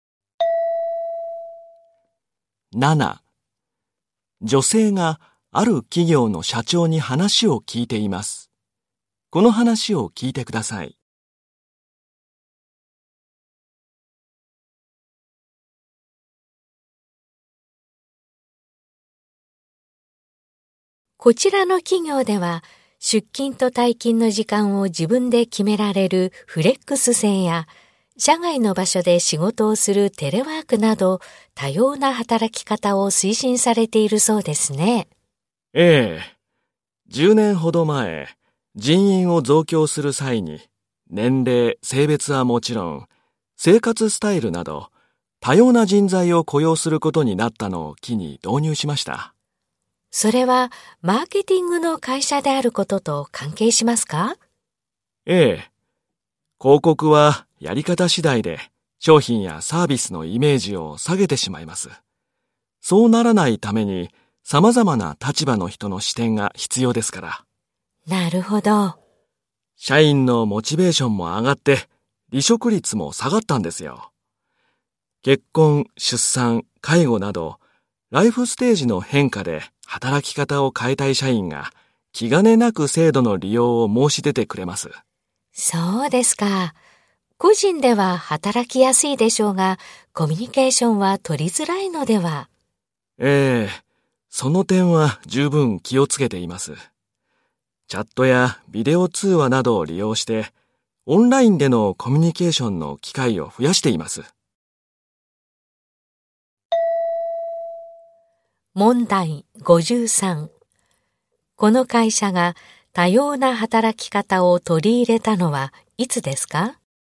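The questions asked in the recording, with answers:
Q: この会社が多様な働き方を取り入れたのはいつですか?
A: 10年ほど前、多様な人材を雇用することになった時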